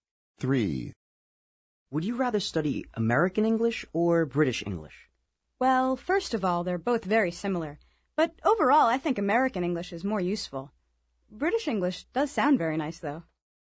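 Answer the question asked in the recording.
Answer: American English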